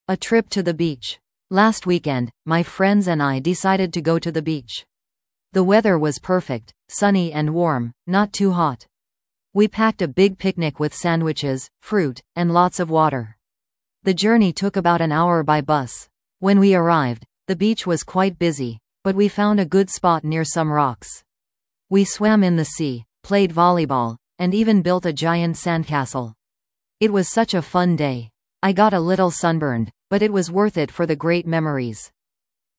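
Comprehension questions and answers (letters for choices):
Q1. How did they travel to the beach?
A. By car.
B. By bus.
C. By train.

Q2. What did they do at the beach besides swimming?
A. They read books and slept.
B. They played volleyball and built a sandcastle.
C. They went fishing and boating.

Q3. How did the person feel after the trip?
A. Bored and tired.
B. Upset because the beach was too crowded.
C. Happy, despite a little sunburn.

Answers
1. B
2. B
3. C

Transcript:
A Trip to the Beach
Last weekend, my friends and I decided to go to the beach. The weather was perfect – sunny and warm, not too hot. We packed a big picnic with sandwiches, fruit, and lots of water. The journey took about an hour by bus. When we arrived, the beach was quite busy, but we found a good spot near some rocks. We swam in the sea, played volleyball, and even built a giant sandcastle. It was such a fun day. 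I got a little sunburned, but it was worth it for the great memories!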